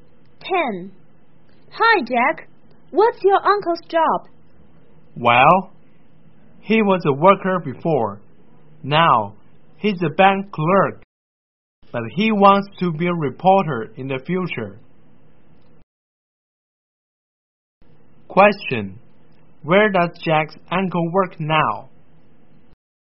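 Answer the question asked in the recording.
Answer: In a bank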